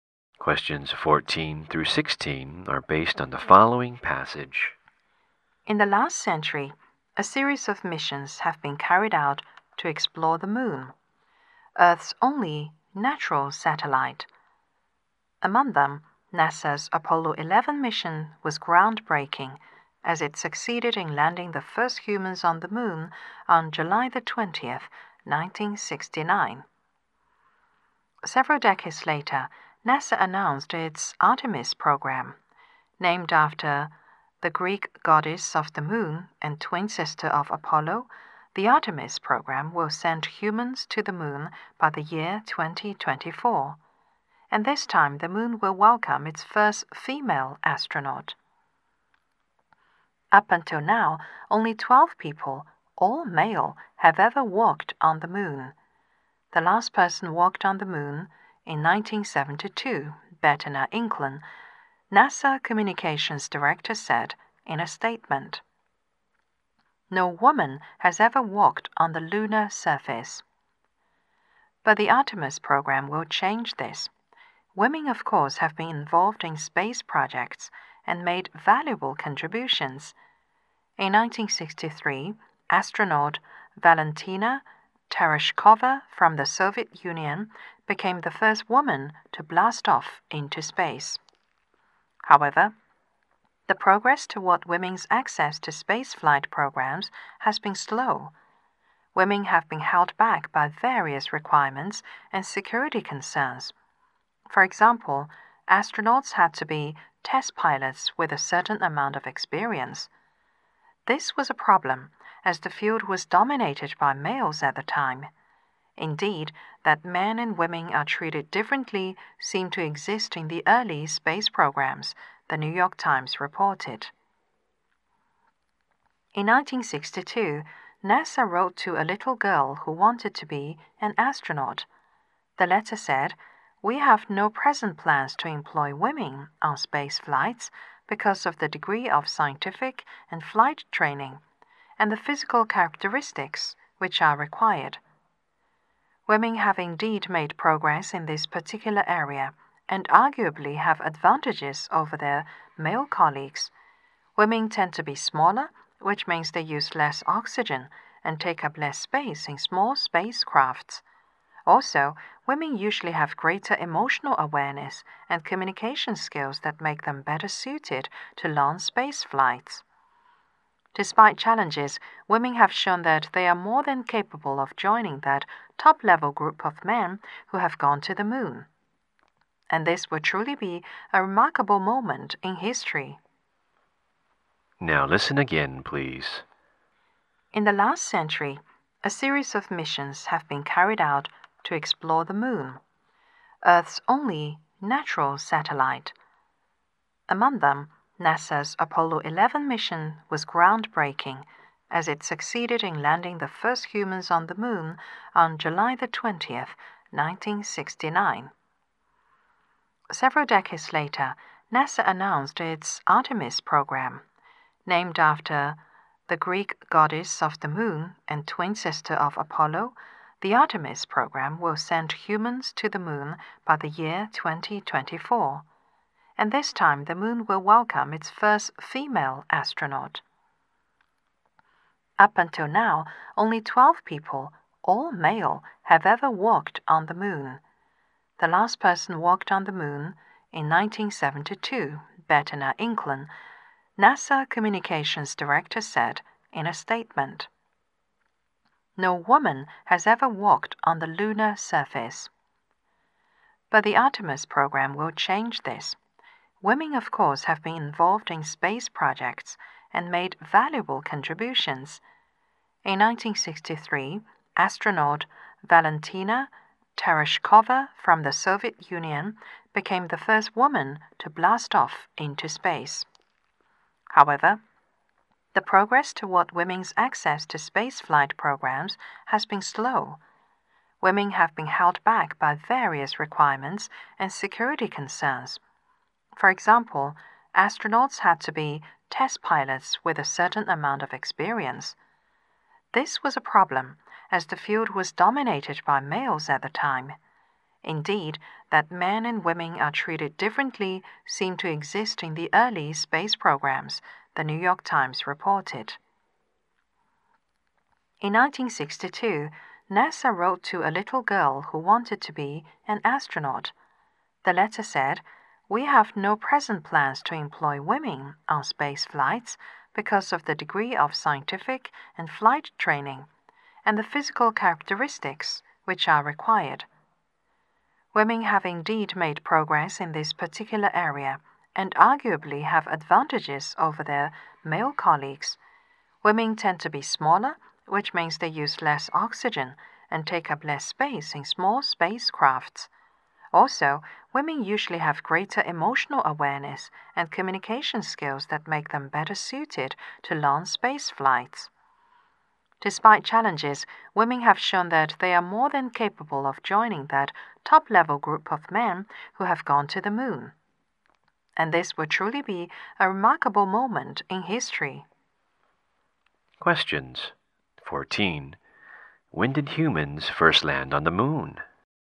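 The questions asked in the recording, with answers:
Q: When did humans first land on the moon?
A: On July 20th, 1969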